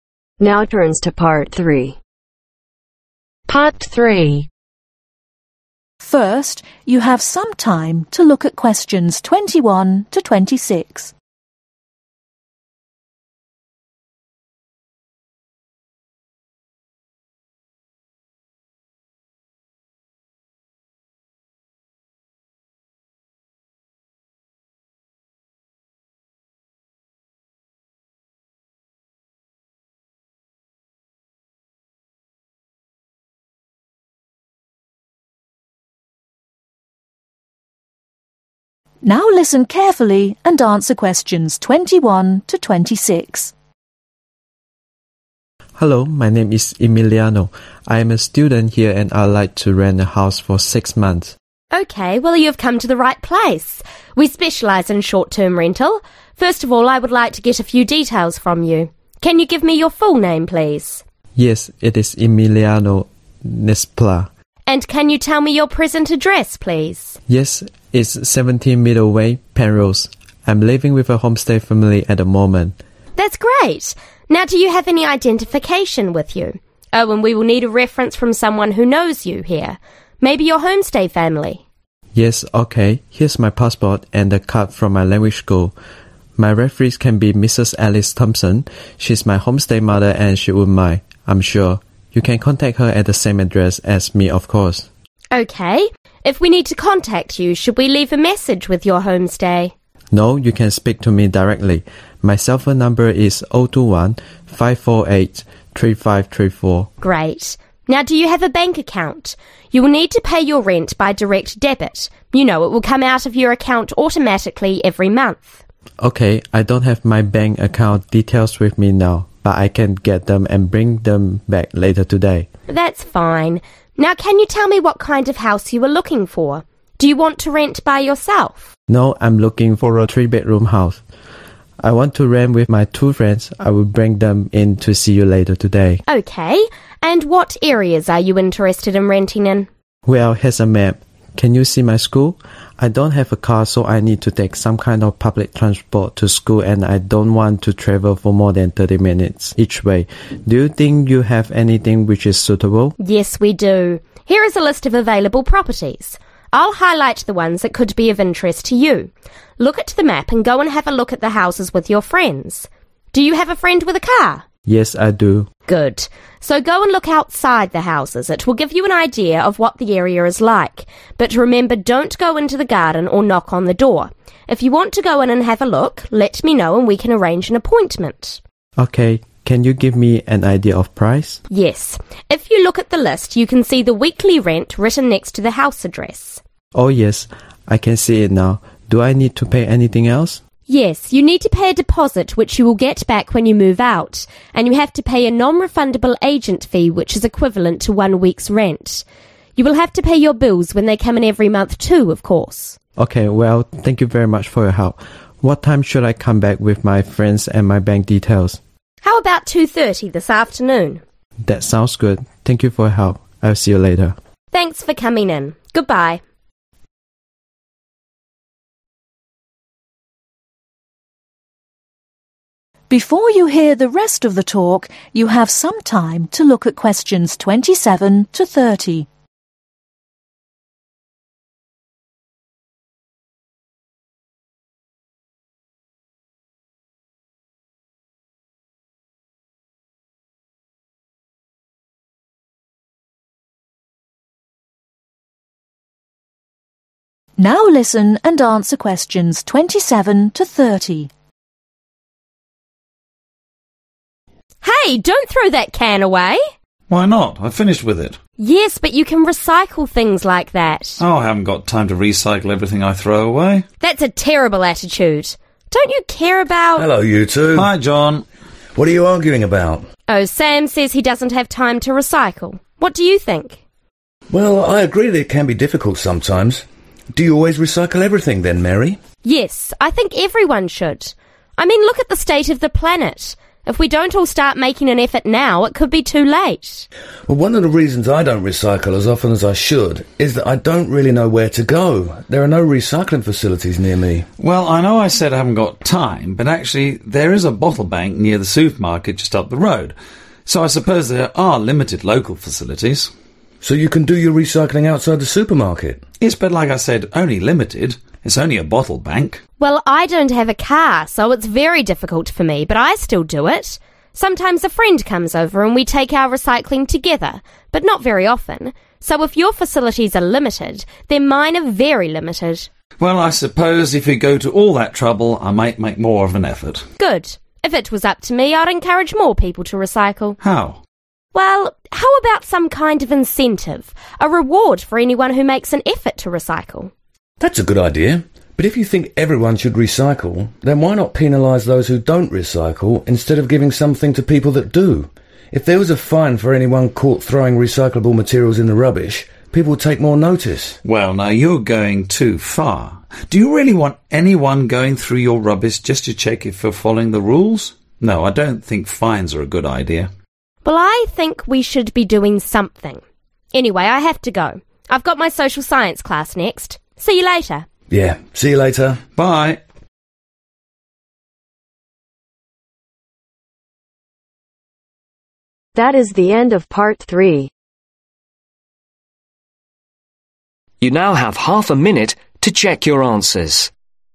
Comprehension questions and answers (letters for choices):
Circle the correct letter A-C.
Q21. Emiliano is hoping to rent a house for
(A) 8 months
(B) 6 months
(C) 7 months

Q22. As proof of identify , Emiliano gives his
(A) Passport and student card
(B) passport and bank card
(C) student card and bank card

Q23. Emiliano can be contracted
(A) on his mobile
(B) by leaving a message at his homestay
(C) by telephoning his school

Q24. Emiliano looking for a house which is less than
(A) half an hour away by bus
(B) one hour away by bus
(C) half an hour away by bus or train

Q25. He can find the weekly cost of the house by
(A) asking the estate agent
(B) looking at the house list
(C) looking at the sign outside the house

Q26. When he moves out Emiliano will get back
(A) his deposit and agent fee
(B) the equivalent of one week's rent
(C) his deposit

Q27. Thinks it can be (27)............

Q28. Limited (28)............ facilities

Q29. Very (29)............ facilities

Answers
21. B
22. A
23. A
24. C
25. B
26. C
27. Difficult
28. Local
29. Limited